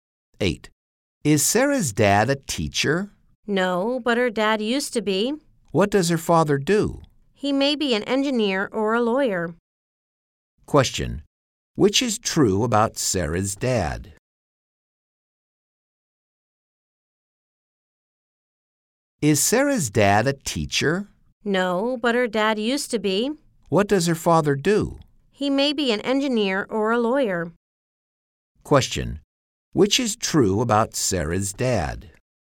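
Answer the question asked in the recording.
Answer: He used to be a teacher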